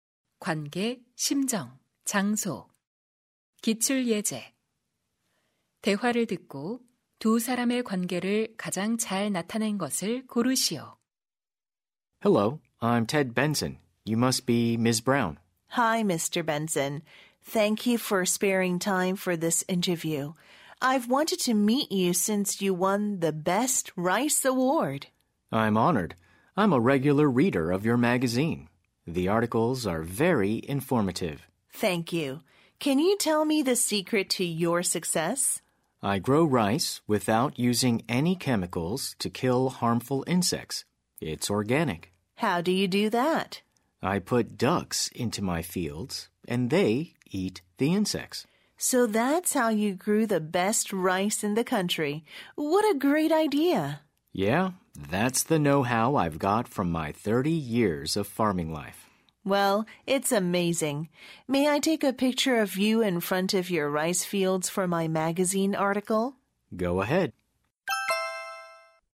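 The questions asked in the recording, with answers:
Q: 대화를 듣고 두 사람의 관계를 가장 잘 나타낸 것을 고르시오.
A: 잡지 기자 - 농부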